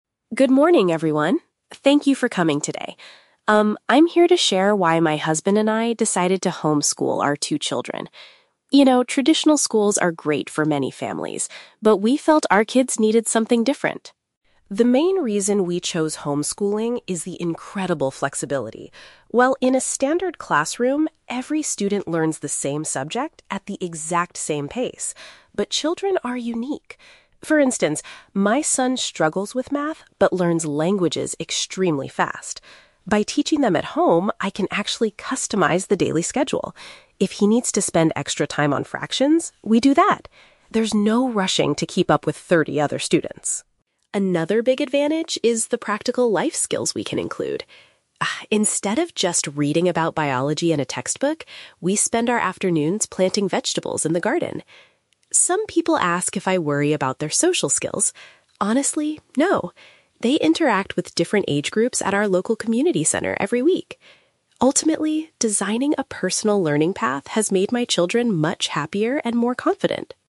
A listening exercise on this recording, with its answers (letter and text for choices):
Listen to a parent speaking at a community seminar about homeschooling and choose the correct answer (A, B, or C) for each question.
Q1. Why did the speaker decide to homeschool her children?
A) She can adapt the study program to fit each child.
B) She believes traditional schools are bad for everyone.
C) She wants to save money on expensive school fees.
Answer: A) She can adapt the study program to fit each child.

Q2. How does the speaker handle her son's learning process?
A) She makes him study math with thirty other students.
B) She spends more time on the subjects he finds difficult.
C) She hires a private tutor to teach him foreign languages.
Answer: B) She spends more time on the subjects he finds difficult.

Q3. How do the children learn about biology?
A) By reading a lot of science books.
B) By growing plants outside the house.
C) By visiting the local science museum.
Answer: B) By growing plants outside the house.

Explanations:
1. The speaker says she can "customize the daily schedule" and design a "personal learning path" because children learn at different speeds. "Adapt the study program" is a paraphrase of this idea. Trap Analysis: Option (B) is a trap. The speaker mentions traditional schools, but she says they are "great for many families," so she does not think they are bad for everyone. Option (C) is a plausible reason for homeschooling in real life, but it is never mentioned in the audio.
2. The speaker mentions that her son "struggles with math" and that if he needs to "spend extra time on fractions, we do that." Trap Analysis: Option (A) is a trap because "thirty other students" is mentioned, but she says there is "no rushing to keep up" with them. Option (C) is not mentioned; she says he learns languages fast, but she doesn't mention a tutor.
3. The speaker states that they "spend our afternoons planting vegetables in the garden." "Growing plants" is a synonym for planting vegetables. Trap Analysis: Option (A) is a trap. She mentions reading, but specifically says they do the gardening "instead of just reading about biology." Option (C) is a plausible educational activity, but it is not mentioned in the audio.

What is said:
Parent: "Good morning, everyone. Thank you for coming today. Um, I'm here to share why my husband and I decided to homeschool our two children. You know, traditional schools are great for many families, but we felt our kids needed something different.
The main reason we chose homeschooling is the incredible flexibility. Well, in a standard classroom, every student learns the same subject at the exact same pace. But children are unique. For instance, my son struggles with math but learns languages extremely fast. By teaching them at home, I can actually customize the daily schedule. If he needs to spend extra time on fractions, we do that. There's no rushing to keep up with thirty other students.
Another big advantage is the practical life skills we can include. Ah, instead of just reading about biology in a textbook, we spend our afternoons planting vegetables in the garden. Some people ask if I worry about their social skills. Honestly, no. They interact with different age groups at our local community center every week. Ultimately, designing a personal learning path has made my children much happier and more confident."